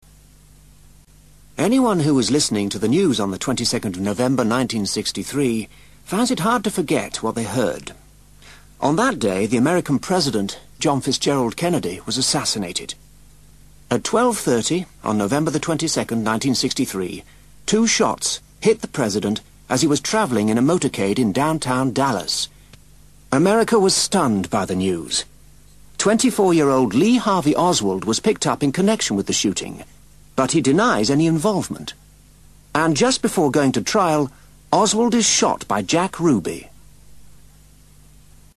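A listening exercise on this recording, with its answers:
ACTIVITY 212: Listen to part of a radio program about Kennedy's assassination and then answer these questions by filling in the blanks below. Then check the answers.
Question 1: TIME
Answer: 12:30

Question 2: FULL DATE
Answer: 22nd November 1963

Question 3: PLACE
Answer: Downtown Dallas

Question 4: How did he die?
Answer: He was hit by two shots while travelling in a motorcade.

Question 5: Who was Lee Harvey Oswald?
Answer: A 24-year-old man arrested in connection with the shooting.

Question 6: What happened to him?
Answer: He was shot by Jack Ruby before going to trial.

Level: First Certificate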